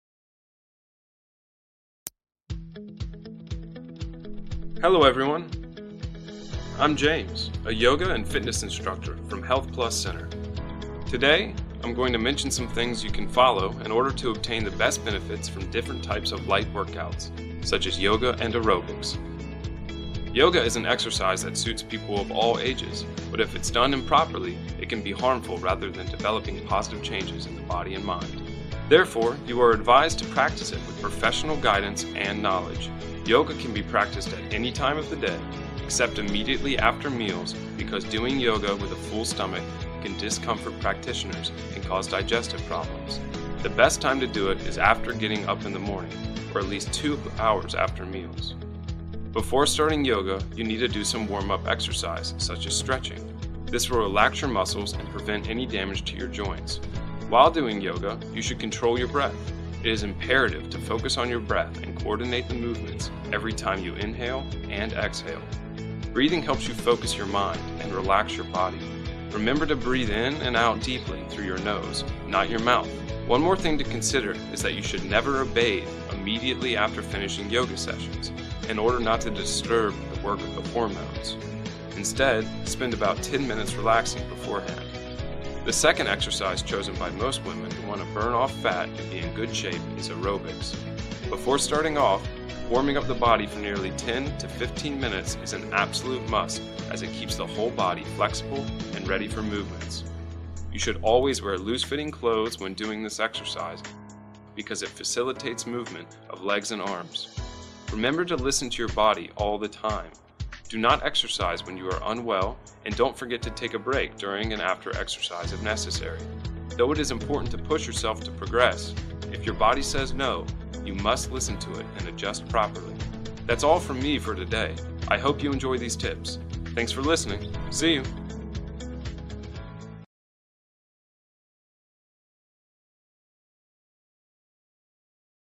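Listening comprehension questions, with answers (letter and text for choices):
Task: Choose the best answer (A, B, or C).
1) When should you NOT do yoga?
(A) In the morning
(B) Right after meals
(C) Two hours after meals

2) What should you do before yoga?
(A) Drink a lot of water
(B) Do some warm-up exercises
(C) Take a bath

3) You should breathe in and out through your:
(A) Mouth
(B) Nose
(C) Chest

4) Why should you wear loose clothes for aerobics?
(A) To look stylish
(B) To move easily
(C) To lose more fat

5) What must you do if you feel unwell during exercise?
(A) Keep practicing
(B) Slow down or stop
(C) Drink coffee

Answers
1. (B) Right after meals
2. (B) Do some warm-up exercises
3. (B) Nose
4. (B) To move easily
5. (B) Slow down or stop

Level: lớp 11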